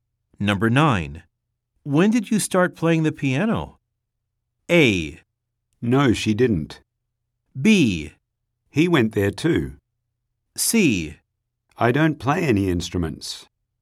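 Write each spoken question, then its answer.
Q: When did you start playing the piano?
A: C: I don't play any instruments.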